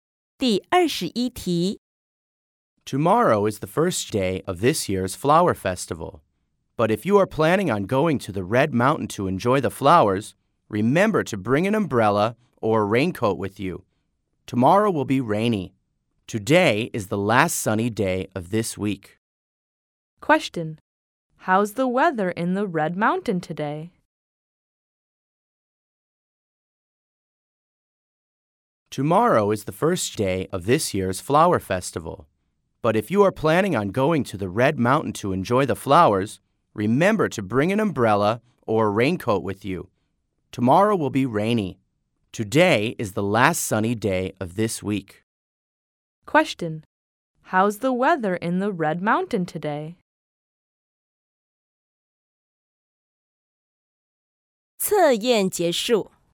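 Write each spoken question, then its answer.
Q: How's the weather in the Red Mountain today?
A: Sunny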